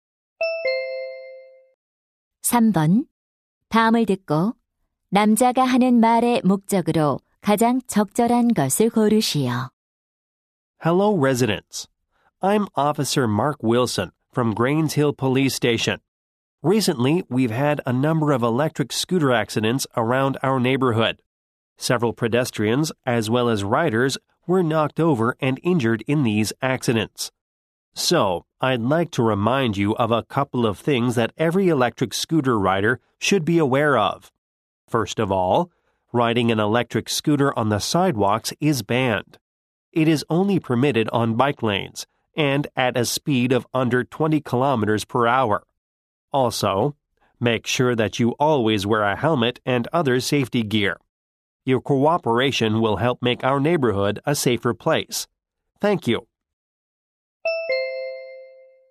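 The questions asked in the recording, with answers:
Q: 다음을 듣고 남자가 하는 말의 목적으로 가장 적절한 것을 고르시오.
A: 전동 킥보드 안전 수칙을 상기시키려고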